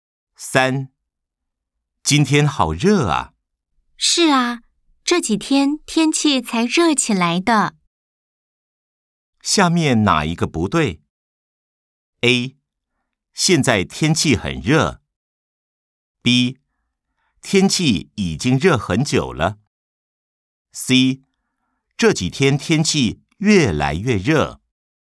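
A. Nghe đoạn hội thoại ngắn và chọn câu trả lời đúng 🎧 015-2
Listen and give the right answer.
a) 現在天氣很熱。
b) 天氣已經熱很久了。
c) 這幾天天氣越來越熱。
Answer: b) 天氣已經熱很久了。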